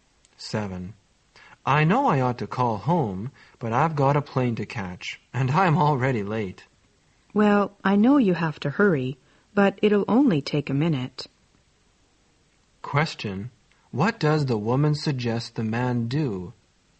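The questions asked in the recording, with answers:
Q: What does the woman suggest the man do?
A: Call home before leaving.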